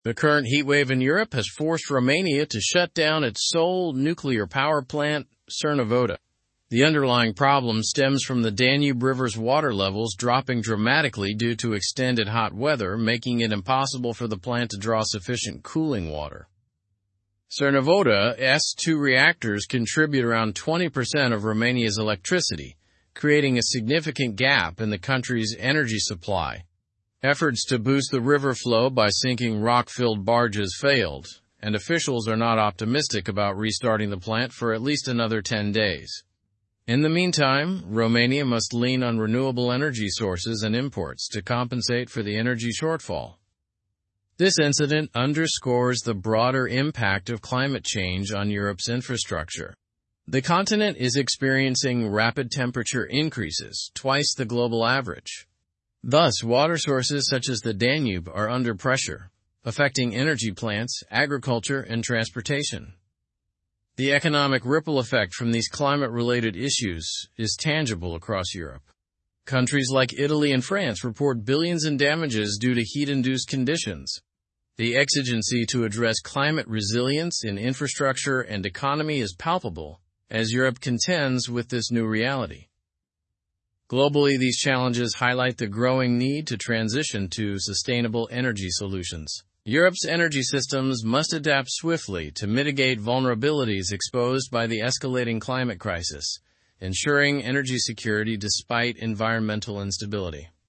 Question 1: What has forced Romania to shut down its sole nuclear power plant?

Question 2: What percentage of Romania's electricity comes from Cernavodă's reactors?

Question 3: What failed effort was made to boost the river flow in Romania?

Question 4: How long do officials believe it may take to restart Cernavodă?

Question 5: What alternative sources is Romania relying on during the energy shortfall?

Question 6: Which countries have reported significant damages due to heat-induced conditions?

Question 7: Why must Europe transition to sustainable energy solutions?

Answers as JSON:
{"1": "The current heatwave in Europe and the drop in Danube River's water levels.", "2": "Around 20%.", "3": "Sinking rock-filled barges in the river.", "4": "At least another ten days.", "5": "Renewable energy sources and imports.", "6": "Italy and France.", "7": "To mitigate vulnerabilities exposed by the escalating climate crisis."}

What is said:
The current heatwave in Europe has forced Romania to shut down its sole nuclear power plant, Cernavodă. The underlying problem stems from the Danube River's water levels dropping dramatically due to extended hot weather, making it impossible for the plant to draw sufficient cooling water.
Cernavodă's two reactors contribute around 20% of Romania's electricity, creating a significant gap in the country's energy supply. Efforts to boost the river flow by sinking rock-filled barges failed, and officials are not optimistic about restarting the plant for at least another ten days. In the meantime, Romania must lean on renewable energy sources and imports to compensate for the energy shortfall.
This incident underscores the broader impact of climate change on Europe's infrastructure. The continent is experiencing rapid temperature increases, twice the global average. Thus, water sources such as the Danube are under pressure, affecting energy plants, agriculture, and transportation.
The economic ripple effect from these climate-related issues is tangible across Europe. Countries like Italy and France report billions in damages due to heat-induced conditions. The exigency to address climate resilience in infrastructure and economy is palpable as Europe contends with this new reality.
Globally, these challenges highlight the growing need to transition to sustainable energy solutions. Europe's energy systems must adapt swiftly to mitigate vulnerabilities exposed by the escalating climate crisis, ensuring energy security despite environmental instability.

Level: Level 4